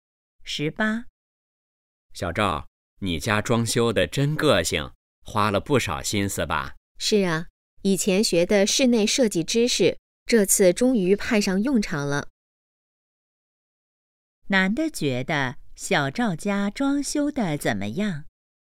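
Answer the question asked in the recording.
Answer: 很有个性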